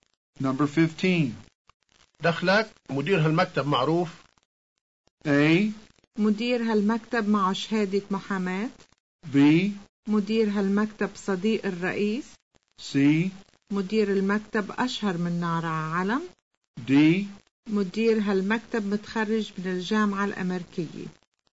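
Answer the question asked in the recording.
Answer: C: مدير المكتب أشهر من نار عالم.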